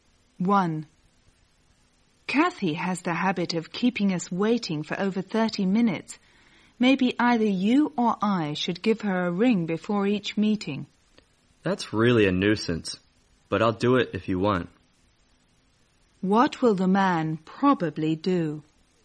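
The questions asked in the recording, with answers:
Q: What will the man probably do?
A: Phone Kathy before each meeting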